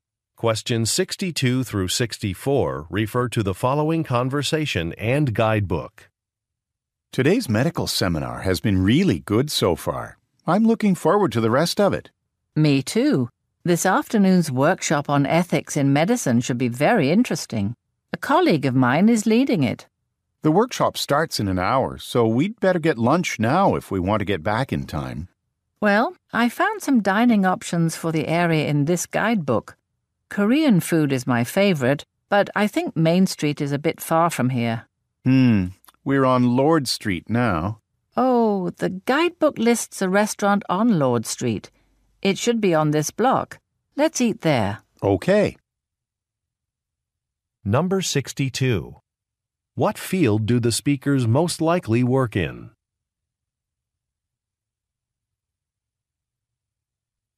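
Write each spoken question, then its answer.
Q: What field do the speakers most likely work in?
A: Medicine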